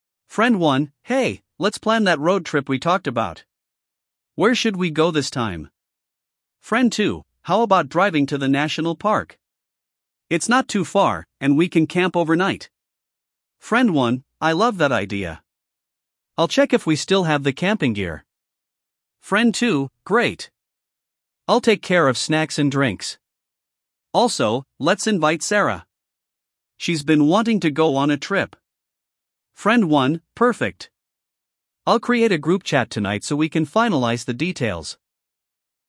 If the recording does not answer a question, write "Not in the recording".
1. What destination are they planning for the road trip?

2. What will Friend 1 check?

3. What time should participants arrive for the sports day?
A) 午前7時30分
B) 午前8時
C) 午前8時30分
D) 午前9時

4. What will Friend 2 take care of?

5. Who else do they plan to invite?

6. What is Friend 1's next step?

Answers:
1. A camping road trip
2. Camping gear
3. Not in the recording
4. Snacks and drinks
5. Sarah
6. Start a group chat

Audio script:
Friend 1: Hey, let's plan that road trip we talked about! Where should we go this time?
Friend 2: How about driving to the national park? It's not too far, and we can camp overnight.
Friend 1: I love that idea. I'll check if we still have the camping gear.
Friend 2: Great! I'll take care of snacks and drinks. Also, let's invite Sarah. She's been wanting to go on a trip.
Friend 1: Perfect! I'll create a group chat tonight so we can finalize the details.